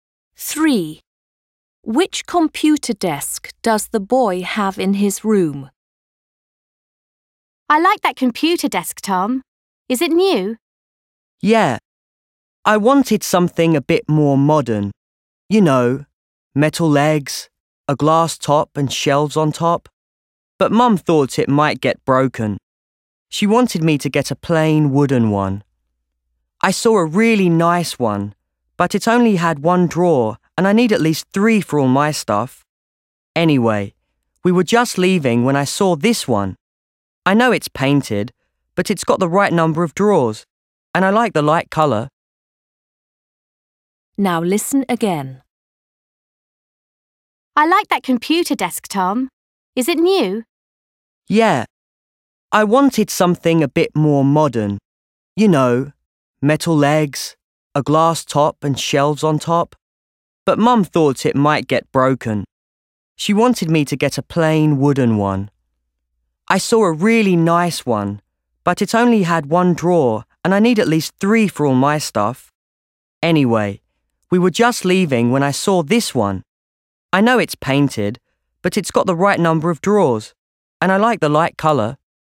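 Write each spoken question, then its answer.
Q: Which computer desk does the boy have in his room?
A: A painted, light-coloured desk with at least three drawers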